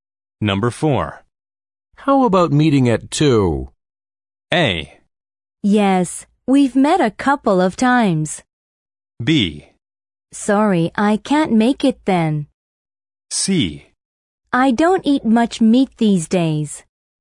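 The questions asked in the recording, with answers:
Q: How about meeting at 2?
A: B: Sorry, I can't make it then.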